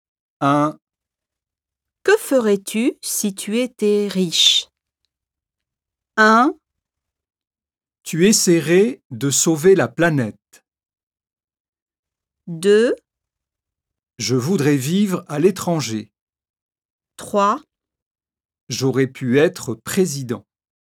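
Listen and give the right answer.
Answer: 2: Je voudrais vivre à l'étranger.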